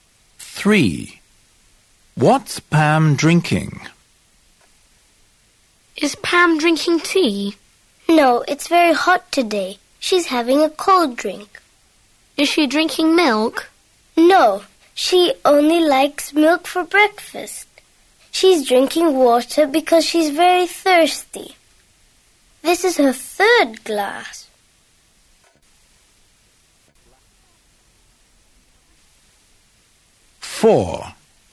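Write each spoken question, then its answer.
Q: What's Pam drinking?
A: Water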